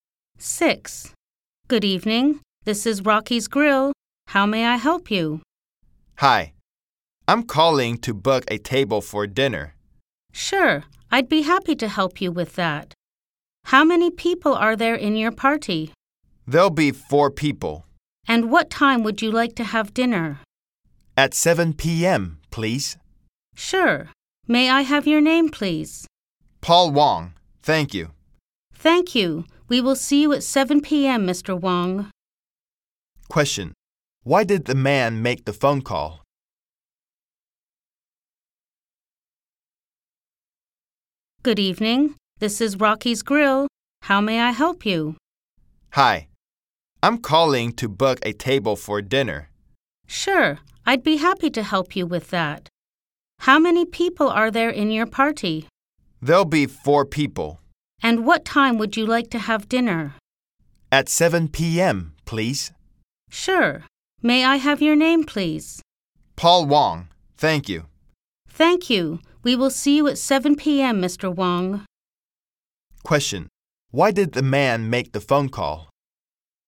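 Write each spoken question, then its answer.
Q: Why did the man make the phone call?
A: To book a table for dinner.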